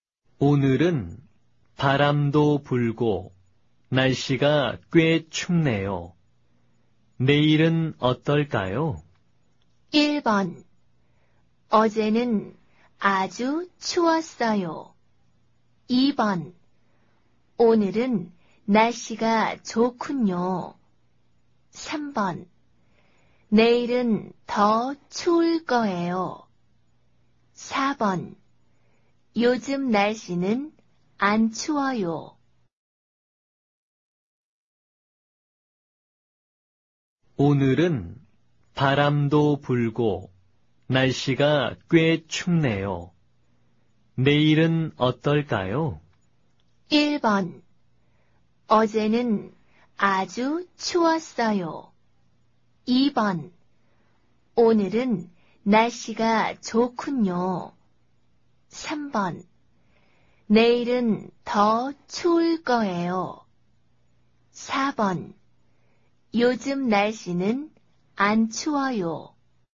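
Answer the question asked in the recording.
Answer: 3: 내일은 더 추울 거예요.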